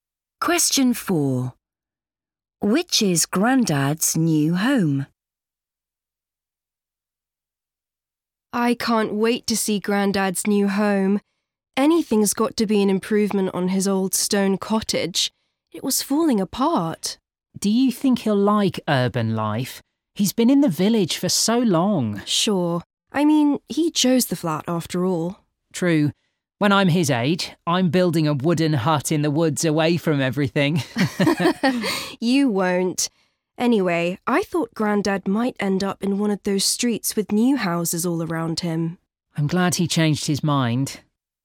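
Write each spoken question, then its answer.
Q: Which is Grandad's new home?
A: A flat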